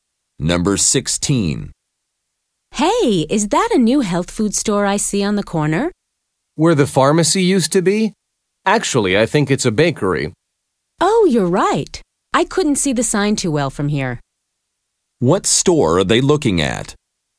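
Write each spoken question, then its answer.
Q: What store are they looking at?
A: A bakery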